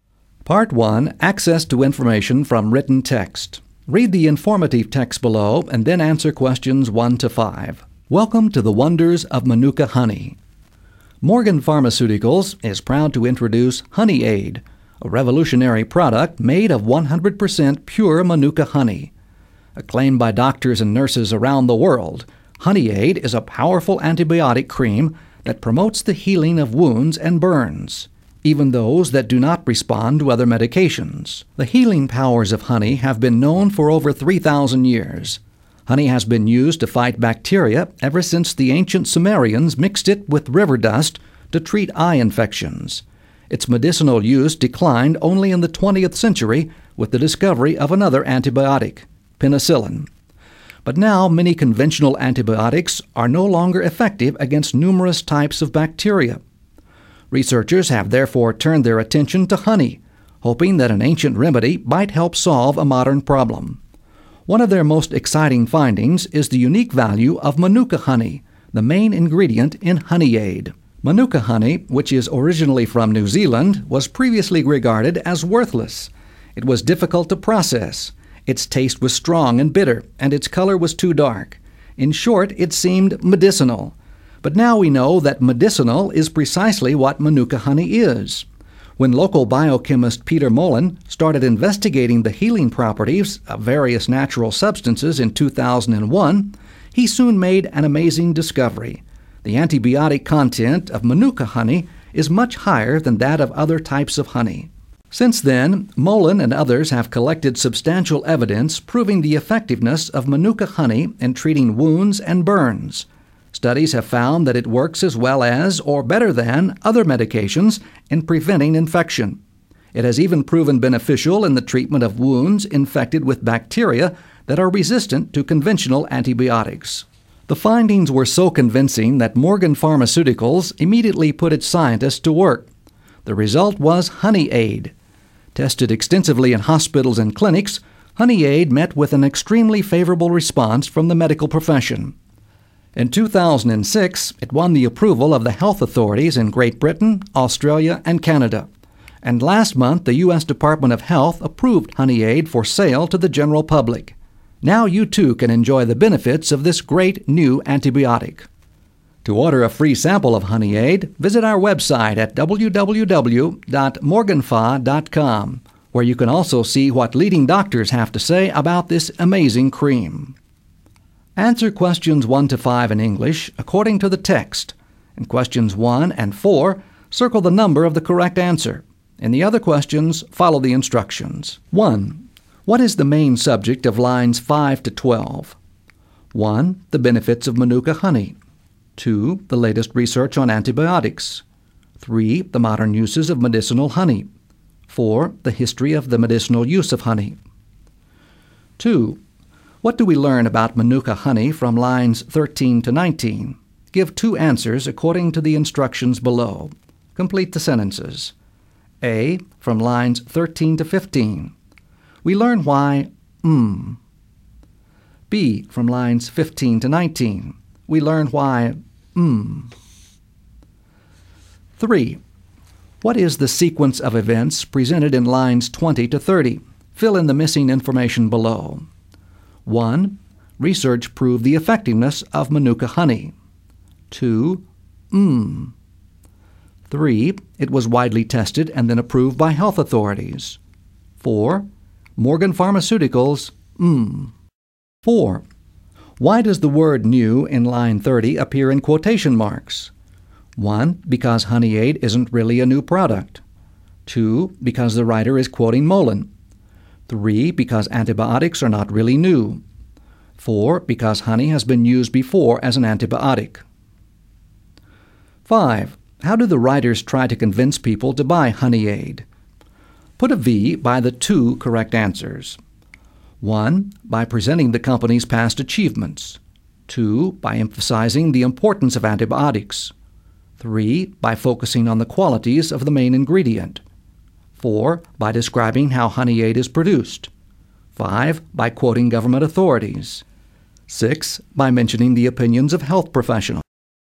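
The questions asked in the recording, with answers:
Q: What is the main subject of lines 5 to 12?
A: 4: The history of the medicinal use of honey.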